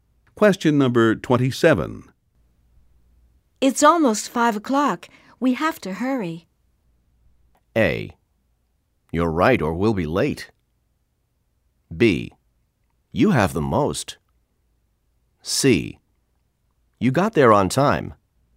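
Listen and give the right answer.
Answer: A: You're right or we'll be late.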